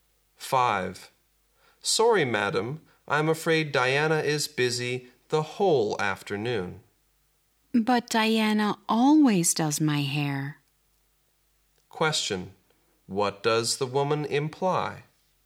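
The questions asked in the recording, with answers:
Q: What does the woman imply?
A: She wants Diana to do her hair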